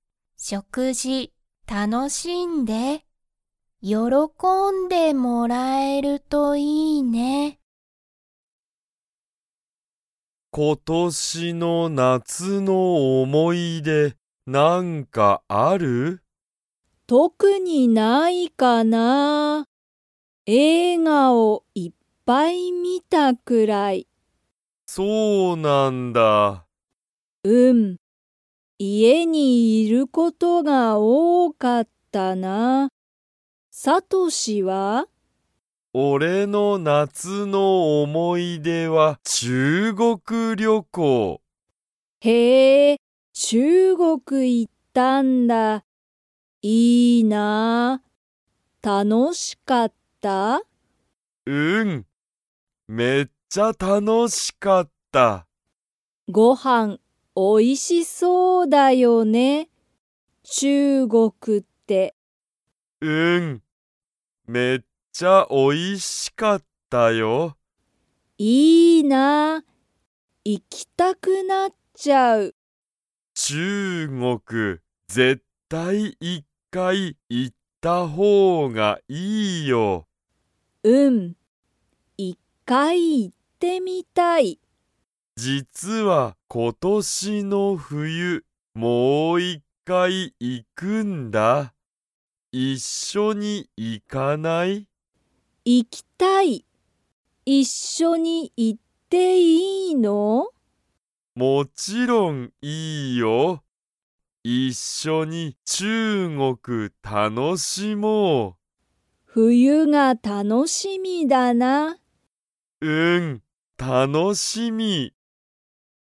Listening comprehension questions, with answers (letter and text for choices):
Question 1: ゆうこは今年ことしの夏なつの思おもい出でが 。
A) たくさんある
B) 特とくにない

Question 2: さとしはいつ、中国ちゅうごくにもう一回いっかい行いきますか?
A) 明日あした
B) 日曜日にちようび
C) 今年ことしの夏なつ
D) 今年ことしの冬ふゆ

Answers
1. B) 特とくにない
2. D) 今年ことしの冬ふゆ

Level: Level 3